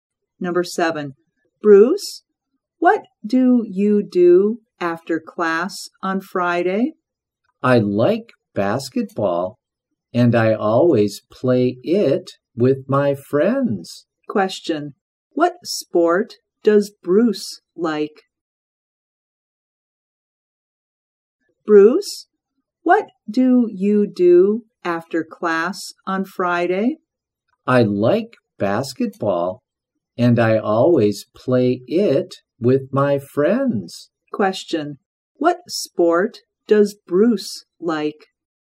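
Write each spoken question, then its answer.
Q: Question, what sport does Bruce like?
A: Basketball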